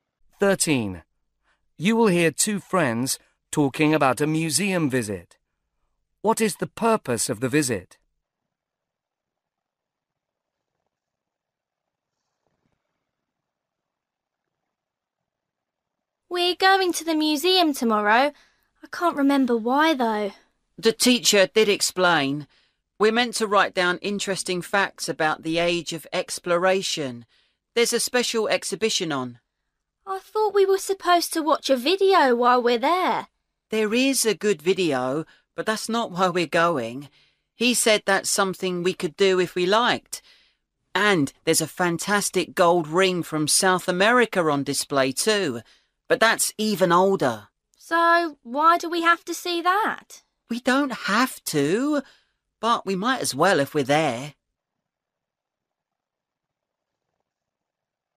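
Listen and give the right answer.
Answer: To write down interesting facts about the age of exploration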